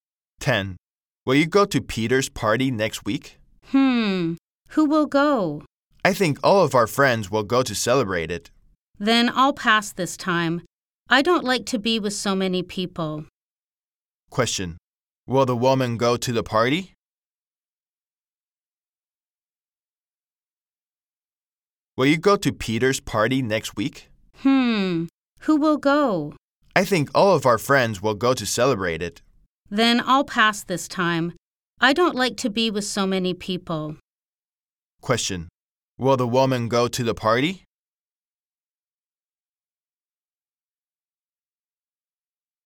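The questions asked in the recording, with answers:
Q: Question. Will the woman go to the party?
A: No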